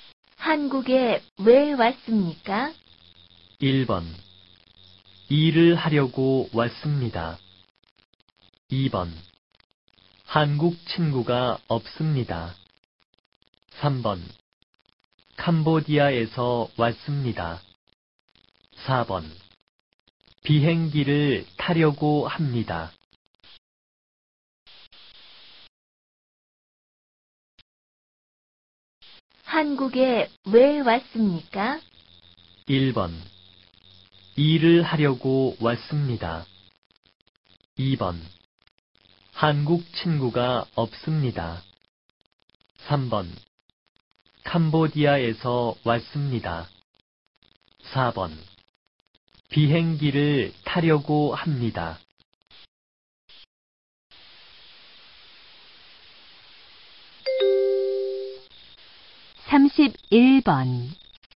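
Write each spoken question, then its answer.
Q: 한국에 왜 왔습니까?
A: 1: 일을 하려고 왔습니다.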